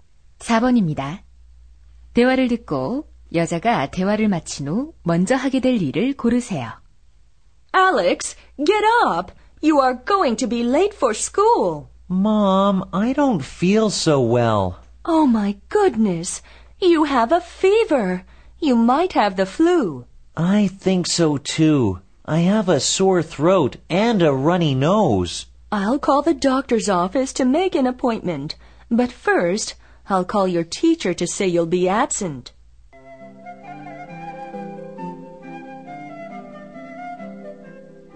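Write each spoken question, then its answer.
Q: 대화를 듣고 여자가 대화를 마친 후 먼저 하게 될 일을 고르세요.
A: 선생님께 결석한다고 전화하기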